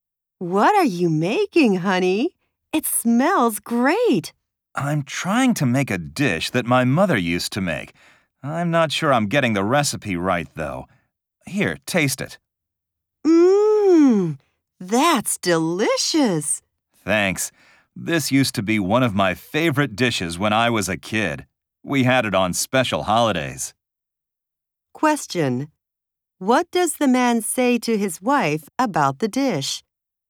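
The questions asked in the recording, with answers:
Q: What does the man say to his wife about the dish?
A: That it tastes delicious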